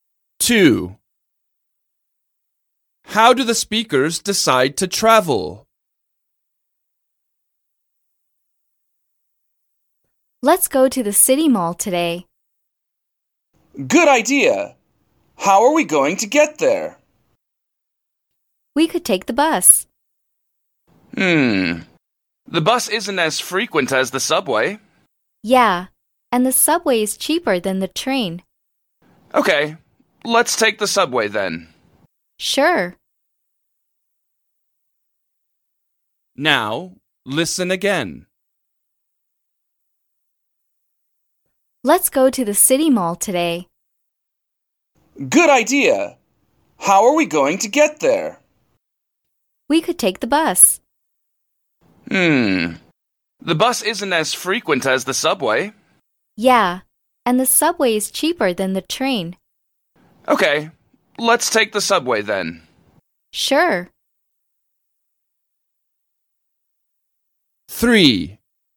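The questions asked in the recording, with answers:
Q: How do the speakers decide to travel?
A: by subway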